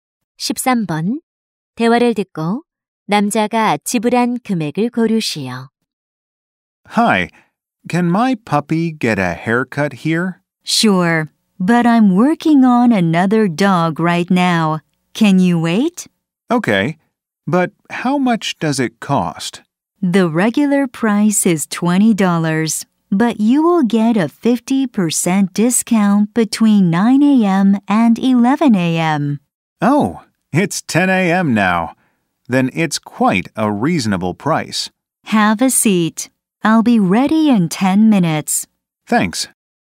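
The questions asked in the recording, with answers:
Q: 대화를 듣고 남자가 지불한 금액을 고르시오.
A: 10달러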